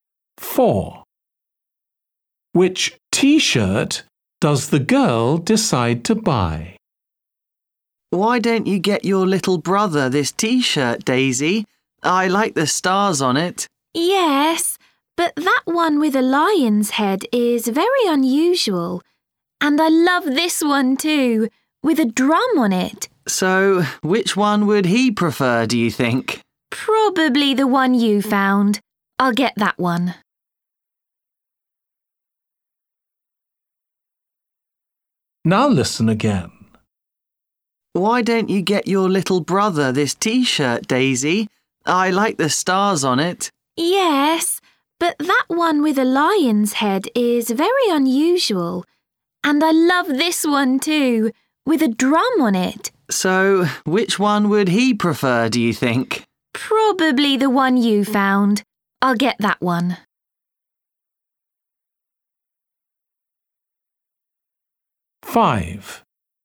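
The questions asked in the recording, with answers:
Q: Which t-shirt does the girl decide to buy?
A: The one with stars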